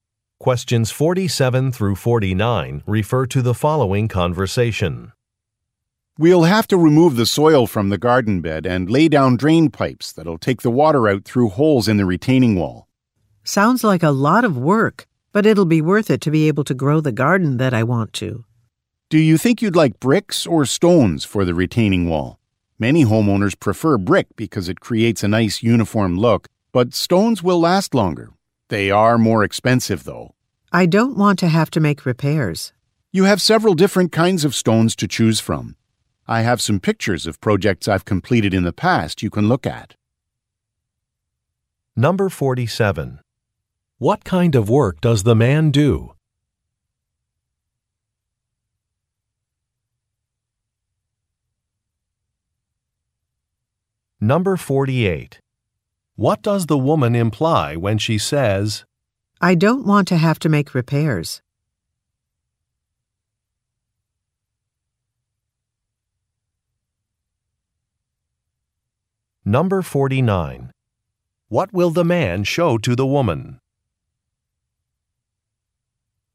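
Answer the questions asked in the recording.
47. Landscaping / garden construction
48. She prefers the longer-lasting stones
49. Pictures of past projects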